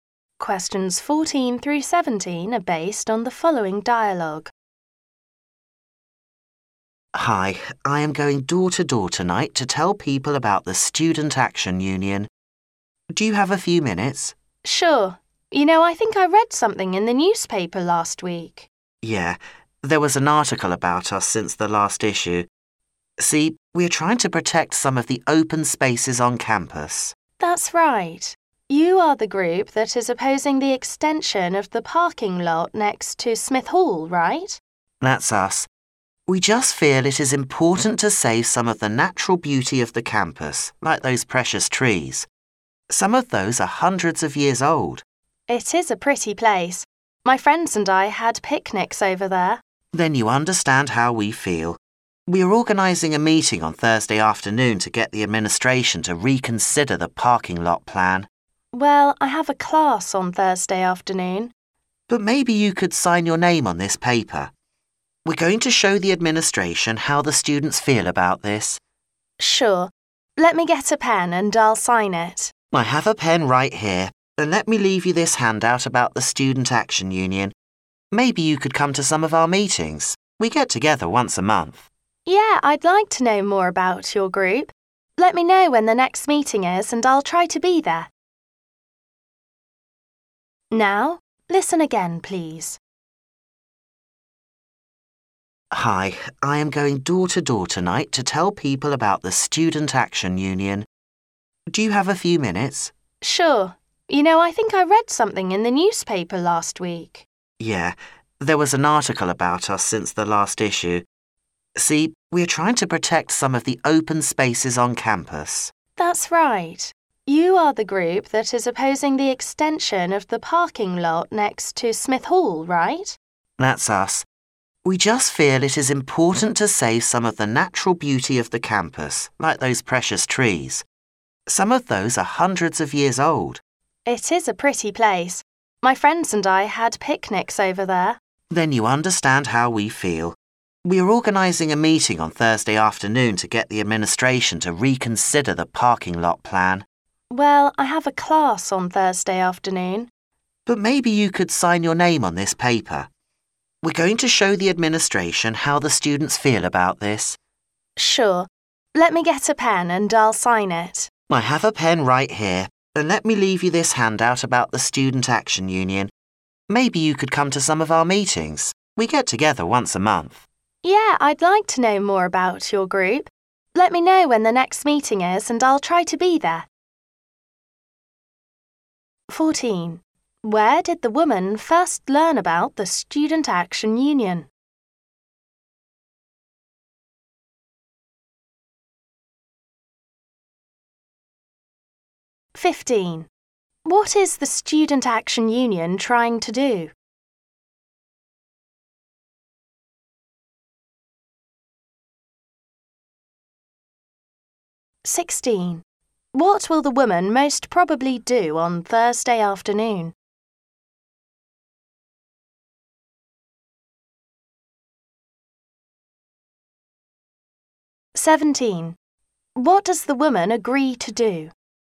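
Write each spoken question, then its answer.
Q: Where did the woman first learn about the Student Action Union?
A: In the newspaper

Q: What is the Student Action Union trying to do?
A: Protect open spaces on campus by opposing the parking lot extension

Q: What will the woman most probably do on Thursday afternoon?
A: Attend her class

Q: What does the woman agree to do?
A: Sign her name on the paper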